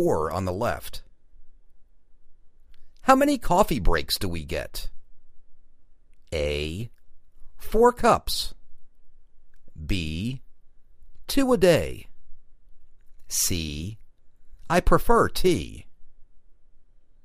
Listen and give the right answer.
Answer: Two a day